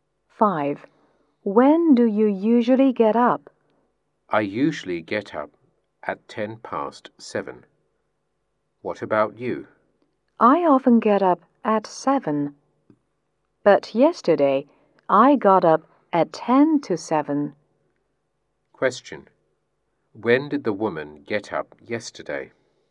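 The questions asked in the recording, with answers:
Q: Question, when did the woman get up yesterday?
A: At 7:10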